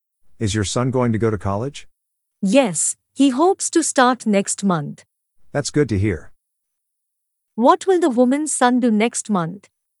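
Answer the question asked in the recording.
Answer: Start college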